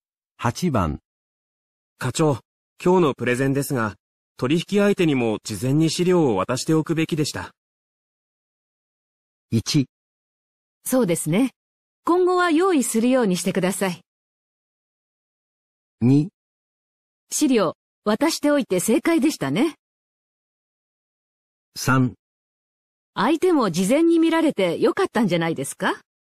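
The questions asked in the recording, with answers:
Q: 課長、今日のプレゼンですが、取引相手にも事前に資料を渡しておくべきでした。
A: 1: そうですね。今後は用意するようにしてください。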